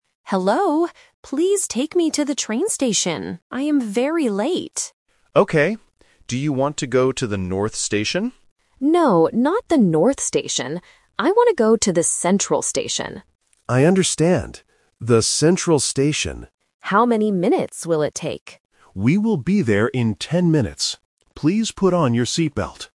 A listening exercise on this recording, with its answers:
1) Where does the passenger want to go?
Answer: To the train station

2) Which station does the passenger want to go to?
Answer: Central Station

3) How many minutes will the trip take?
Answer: Ten minutes